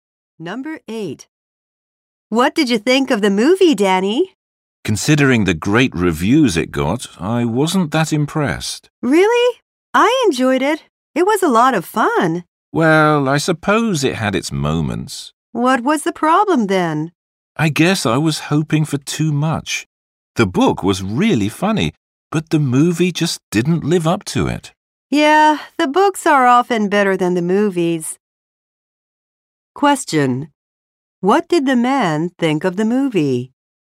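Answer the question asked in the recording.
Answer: It wasn't as good as the book.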